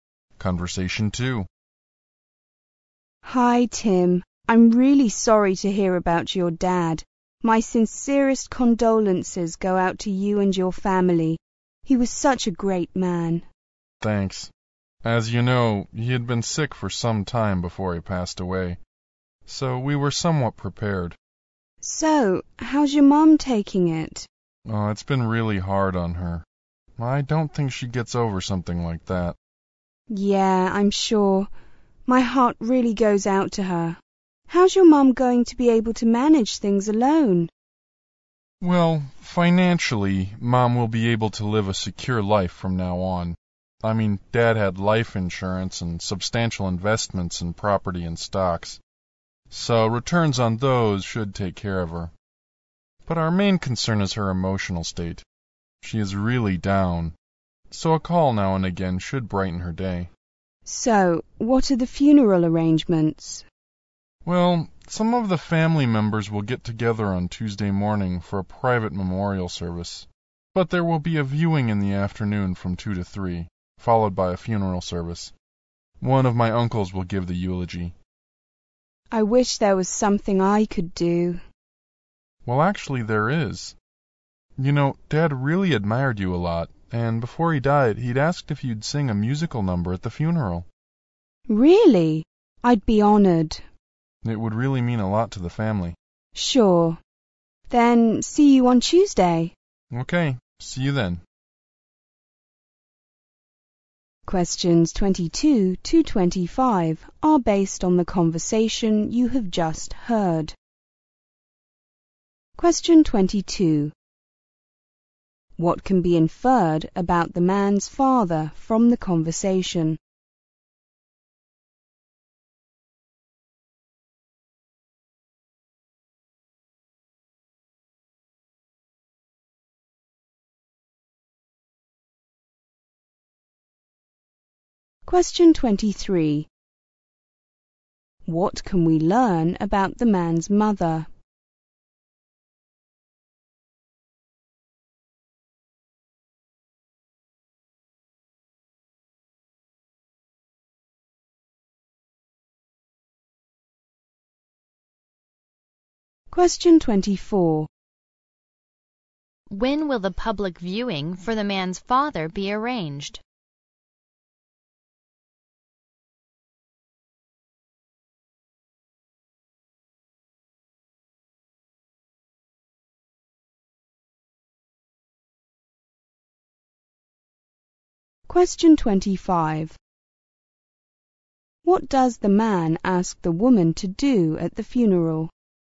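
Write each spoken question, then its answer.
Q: What can be inferred about the man's father from the conversation?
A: He had been ill for some time before he died

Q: What can we learn about the man's mother?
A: She is financially secure but emotionally very down

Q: When will the public viewing for the man's father be arranged?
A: Tuesday afternoon, from 2 to 3

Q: What does the man ask the woman to do at the funeral?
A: Sing a musical number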